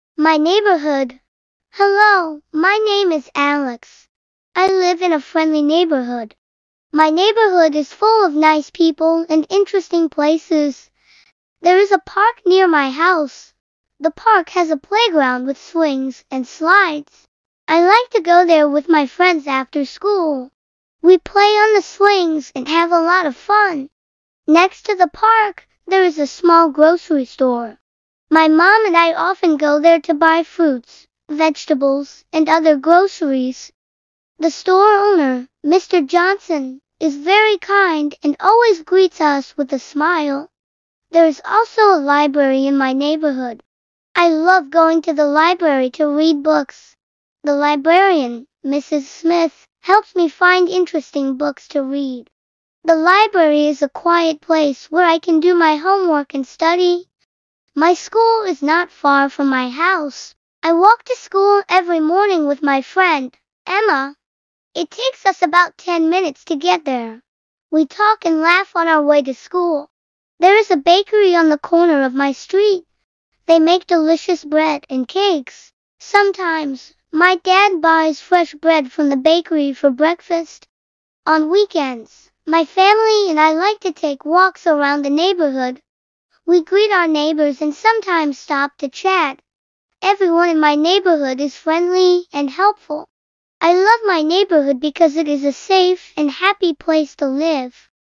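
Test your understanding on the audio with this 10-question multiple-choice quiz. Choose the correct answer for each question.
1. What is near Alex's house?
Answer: A park

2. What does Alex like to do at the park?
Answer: Play on the swings with friends

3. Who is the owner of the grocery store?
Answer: Mr. Johnson

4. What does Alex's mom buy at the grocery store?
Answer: Fruits, vegetables and other groceries

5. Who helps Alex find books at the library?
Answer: Mrs. Smith, the librarian

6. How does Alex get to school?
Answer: He walks

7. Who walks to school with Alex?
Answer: His friend Emma

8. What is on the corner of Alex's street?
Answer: A bakery

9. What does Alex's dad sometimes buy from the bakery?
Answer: Fresh bread for breakfast

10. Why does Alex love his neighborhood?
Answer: Because it is a safe and happy place to live

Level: Basic English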